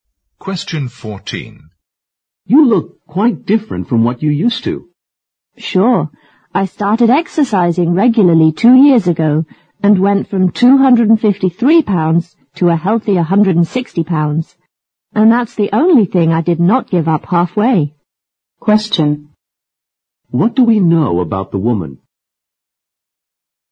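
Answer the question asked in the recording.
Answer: She went from 253 to 160 pounds by exercising regularly for 2 years.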